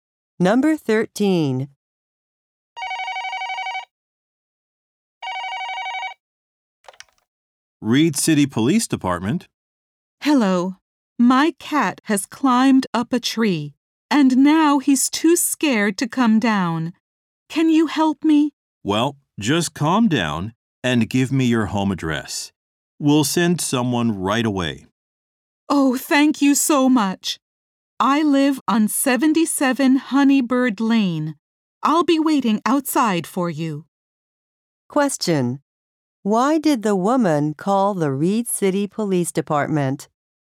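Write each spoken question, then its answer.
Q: Why did the woman call the Reed City Police Department?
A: Her cat climbed a tree and is too scared to come down.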